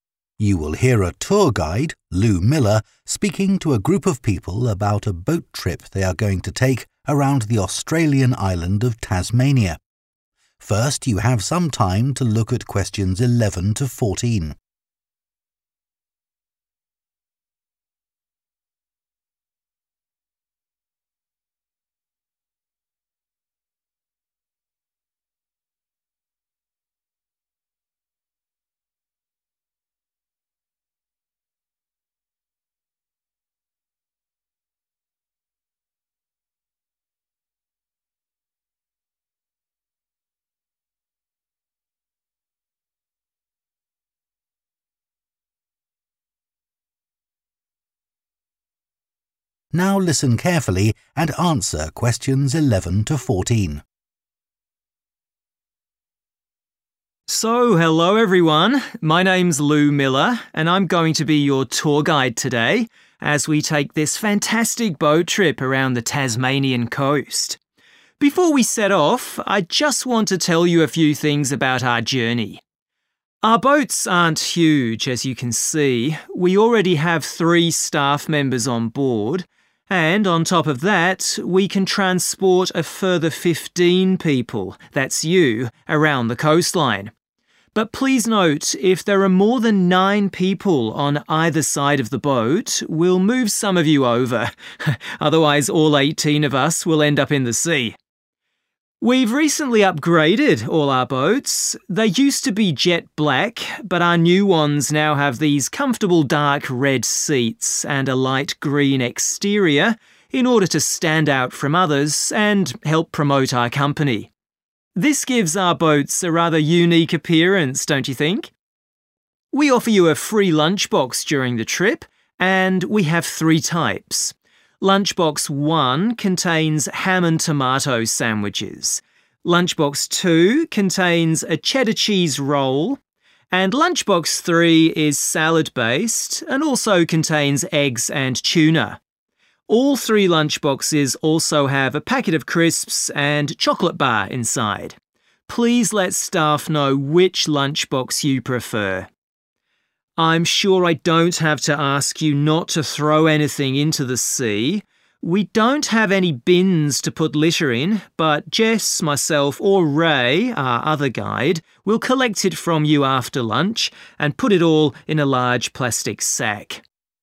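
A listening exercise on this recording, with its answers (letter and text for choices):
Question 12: What colour are the tour boats?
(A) dark red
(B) jet black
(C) light green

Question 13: Which lunchbox is suitable for someone who doesn't eat meat or fish?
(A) Lunchbox 1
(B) Lunchbox 2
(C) Lunchbox 3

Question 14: What should people do with their litter?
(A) take it home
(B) hand it to a member of staff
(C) put it in the bins provided on the boat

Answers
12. (C) light green
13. (B) Lunchbox 2
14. (B) hand it to a member of staff

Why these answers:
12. They used to be jet black [Đây là màu cũ của tàu → Loại đáp án B], but our new ones now have these comfortable dark red seats and a light-green exterior [những chiếc tàu mới của chúng tôi hiện có ghế màu đỏ sẫm rất thoải mái và bên ngoài màu xanh lục nhạt] ["dark red" là màu của ghế ngồi → Loại đáp án A; màu của tàu thì sẽ là màu bên ngoài, "light green"] (Question 12)
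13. Lunchbox 1 contains ham and tomato sandwiches [bánh kẹp thịt nguội và cà chua → có thịt → Loại đáp án A]. Lunchbox 2 contains a Cheddar cheese roll [cuốn phô mai Cheddar] (Question 13) and Lunchbox 3 is salad-based and also contains eggs and tuna [món salad, có bao gồm trứng và cá ngừ → có cá → Loại đáp án C].
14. We don't have any bins [Không có thùng rác trên tàu → Loại đáp án C] to put litter in, but Jess, myself or Ray, our other guide, will collect it from you after lunch and put it all in a large plastic sack [Jess, tôi hoặc Ray, người hướng dẫn viên còn lại, sẽ thu thập rác từ bạn sau bữa trưa và cho tất cả vào một bao nhựa lớn] (Question 14).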